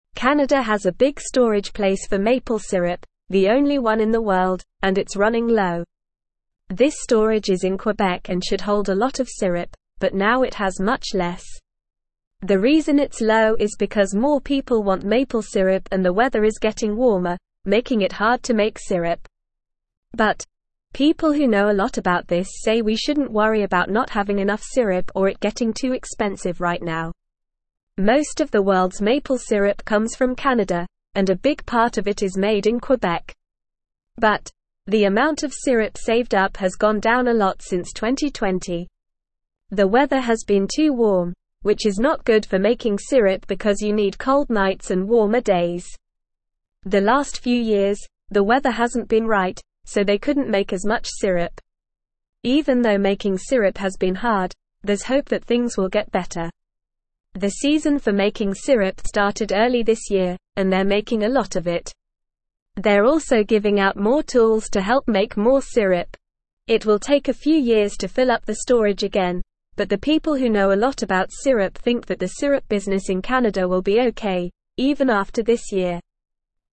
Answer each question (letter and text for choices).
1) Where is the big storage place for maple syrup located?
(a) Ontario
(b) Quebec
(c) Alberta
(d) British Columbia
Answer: (b) Quebec

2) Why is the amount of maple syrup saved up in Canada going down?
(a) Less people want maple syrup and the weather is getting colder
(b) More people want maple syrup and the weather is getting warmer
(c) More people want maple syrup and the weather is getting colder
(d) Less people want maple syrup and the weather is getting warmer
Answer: (b) More people want maple syrup and the weather is getting warmer

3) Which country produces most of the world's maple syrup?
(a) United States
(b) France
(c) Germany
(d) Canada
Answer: (d) Canada

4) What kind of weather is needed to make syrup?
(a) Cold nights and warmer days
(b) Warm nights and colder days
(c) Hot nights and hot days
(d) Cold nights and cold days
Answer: (a) Cold nights and warmer days

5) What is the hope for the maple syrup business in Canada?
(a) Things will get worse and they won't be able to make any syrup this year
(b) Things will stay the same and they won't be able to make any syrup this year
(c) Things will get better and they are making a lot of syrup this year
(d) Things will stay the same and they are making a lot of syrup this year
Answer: (c) Things will get better and they are making a lot of syrup this year

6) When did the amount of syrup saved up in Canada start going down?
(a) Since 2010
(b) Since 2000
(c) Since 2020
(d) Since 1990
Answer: (c) Since 2020

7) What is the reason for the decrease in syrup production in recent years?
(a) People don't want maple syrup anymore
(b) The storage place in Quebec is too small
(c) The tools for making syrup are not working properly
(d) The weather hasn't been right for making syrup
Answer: (d) The weather hasn't been right for making syrup

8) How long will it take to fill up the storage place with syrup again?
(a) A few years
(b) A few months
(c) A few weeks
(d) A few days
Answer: (a) A few years

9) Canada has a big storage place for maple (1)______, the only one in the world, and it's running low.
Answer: syrup

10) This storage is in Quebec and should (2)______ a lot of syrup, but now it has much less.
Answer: hold

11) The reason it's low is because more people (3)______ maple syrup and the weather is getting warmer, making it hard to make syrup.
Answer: want

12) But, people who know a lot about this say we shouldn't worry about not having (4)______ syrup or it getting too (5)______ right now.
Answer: enough

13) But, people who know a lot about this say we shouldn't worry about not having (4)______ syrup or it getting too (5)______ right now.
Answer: expensive

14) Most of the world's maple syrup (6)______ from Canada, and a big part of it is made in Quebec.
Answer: comes

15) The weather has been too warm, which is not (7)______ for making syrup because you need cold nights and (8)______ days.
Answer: good

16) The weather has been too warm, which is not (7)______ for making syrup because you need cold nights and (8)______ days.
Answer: warmer

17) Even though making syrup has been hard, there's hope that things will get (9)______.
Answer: better

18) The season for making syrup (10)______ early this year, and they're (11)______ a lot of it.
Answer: started

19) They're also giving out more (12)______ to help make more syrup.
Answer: tools

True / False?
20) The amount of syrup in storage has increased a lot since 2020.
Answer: False

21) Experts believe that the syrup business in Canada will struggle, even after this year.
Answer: False

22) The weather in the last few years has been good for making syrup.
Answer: False

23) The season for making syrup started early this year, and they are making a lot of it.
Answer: True

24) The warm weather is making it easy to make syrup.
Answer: False

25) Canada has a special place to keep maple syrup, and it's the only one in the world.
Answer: True

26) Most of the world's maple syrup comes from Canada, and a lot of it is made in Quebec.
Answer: True

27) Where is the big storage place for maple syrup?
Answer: The big storage place for maple syrup is in Quebec, Canada.

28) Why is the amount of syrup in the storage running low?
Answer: The amount of syrup in the storage is running low because more people want maple syrup and the weather is getting warmer, making it harder to make syrup.

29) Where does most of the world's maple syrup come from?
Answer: Most of the world's maple syrup comes from Canada.

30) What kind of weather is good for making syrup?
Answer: Cold nights and warmer days are good for making syrup.

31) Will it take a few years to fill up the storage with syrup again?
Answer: Yes, it will take a few years to fill up the storage with syrup again.

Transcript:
Canada has a big storage place for maple syrup, the only one in the world, and it's running low. This storage is in Quebec and should hold a lot of syrup, but now it has much less. The reason it's low is because more people want maple syrup and the weather is getting warmer, making it hard to make syrup. But, people who know a lot about this say we shouldn't worry about not having enough syrup or it getting too expensive right now.
Most of the world's maple syrup comes from Canada, and a big part of it is made in Quebec. But, the amount of syrup saved up has gone down a lot since 2020. The weather has been too warm, which is not good for making syrup because you need cold nights and warmer days. The last few years, the weather hasn't been right, so they couldn't make as much syrup.
Even though making syrup has been hard, there's hope that things will get better. The season for making syrup started early this year, and they're making a lot of it. They're also giving out more tools to help make more syrup. It will take a few years to fill up the storage again, but the people who know a lot about syrup think that the syrup business in Canada will be okay, even after this year.

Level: Level 2